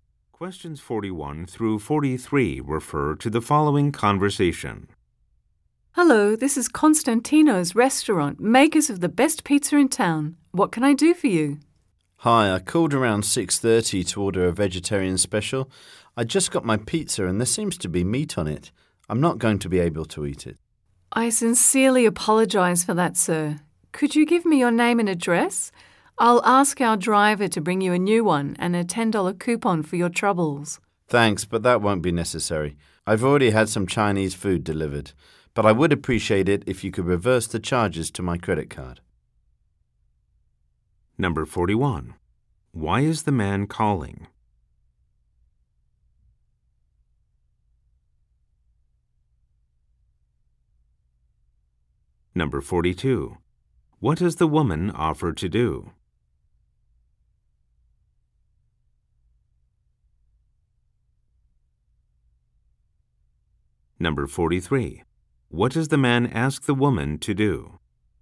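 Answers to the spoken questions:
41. His vegetarian pizza arrived with meat on it
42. Send a new pizza and a $10 coupon
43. Reverse the charges to his credit card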